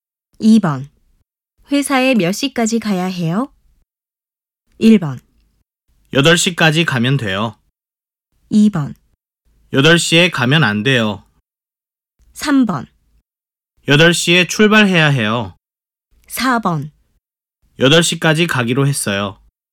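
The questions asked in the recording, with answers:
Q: 회사에 몇 시까지 가야 해요?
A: 1: 8시까지 가면 돼요.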